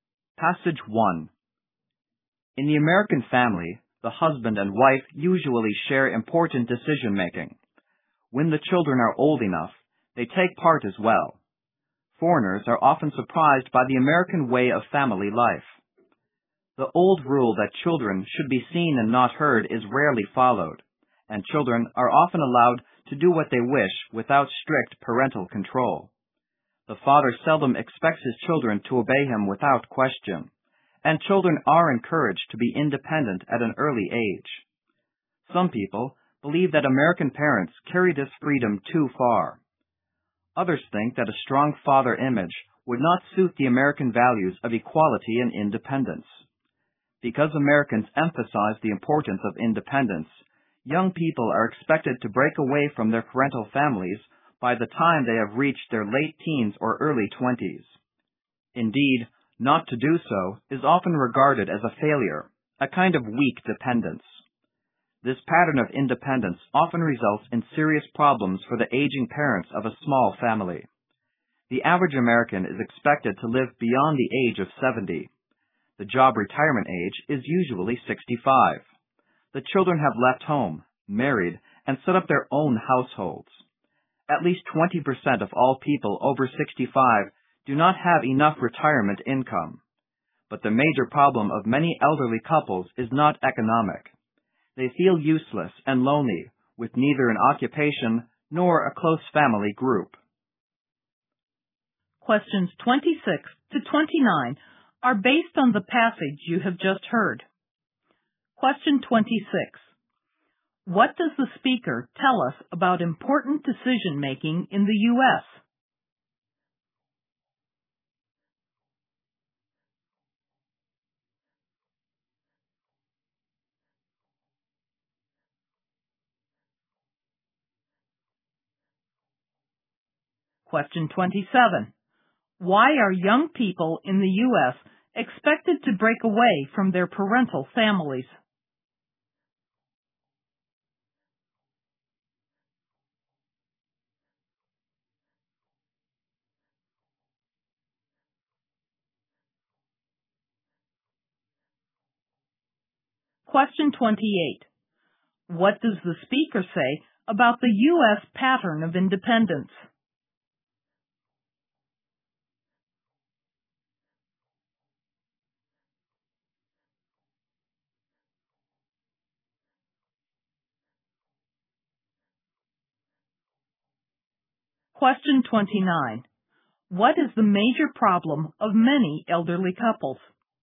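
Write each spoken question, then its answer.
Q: What does the speaker tell us about important decision-making in the U.S.?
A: Husband and wife usually share it

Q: Why are young people in the U.S.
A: Because Americans emphasize independence

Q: What does the speaker say about the U.S.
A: It often causes serious problems for aging parents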